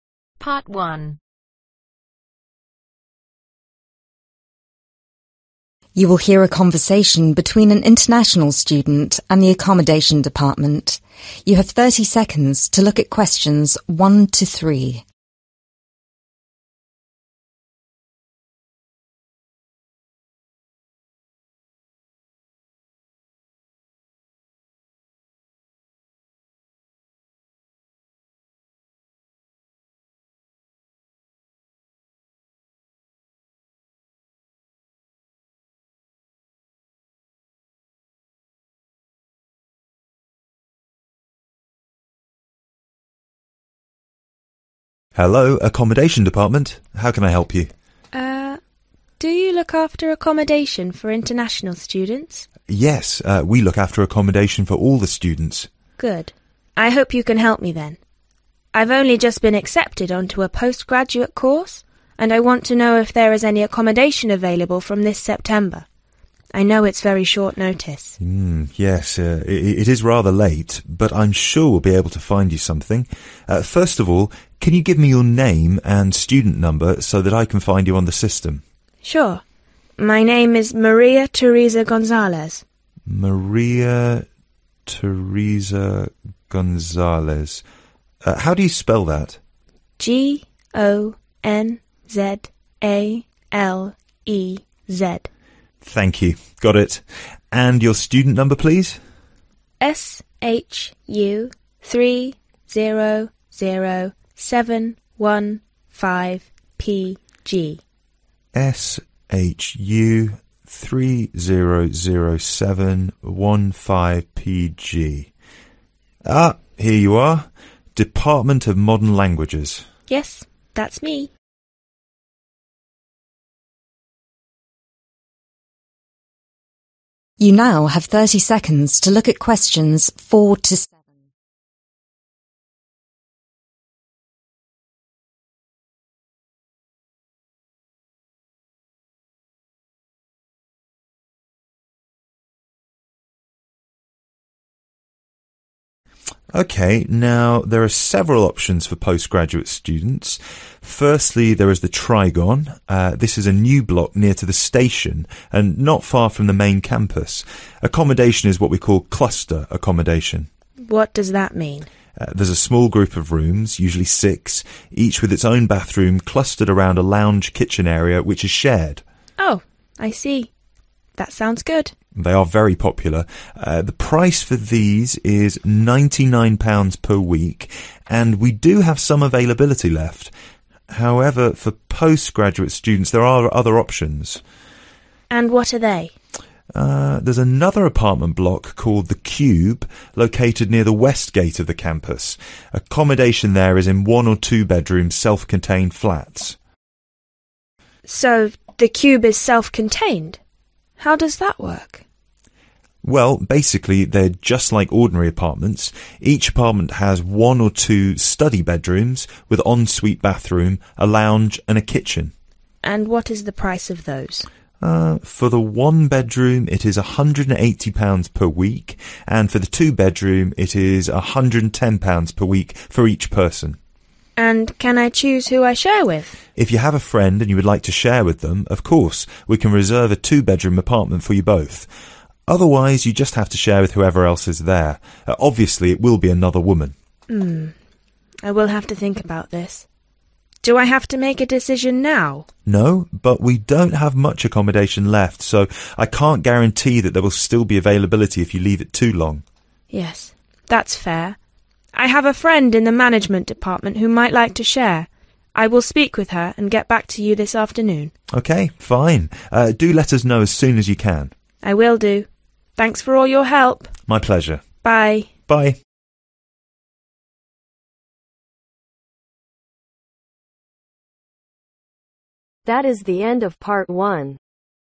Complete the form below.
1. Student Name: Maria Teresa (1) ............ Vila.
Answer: GONZALEZ

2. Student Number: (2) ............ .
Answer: SHU300715PG

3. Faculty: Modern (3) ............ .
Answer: languages

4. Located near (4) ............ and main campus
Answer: station

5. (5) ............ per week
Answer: £99

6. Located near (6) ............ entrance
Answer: west